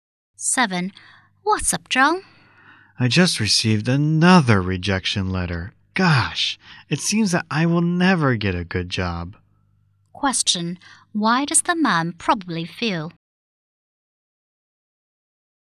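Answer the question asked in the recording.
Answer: Disappointed.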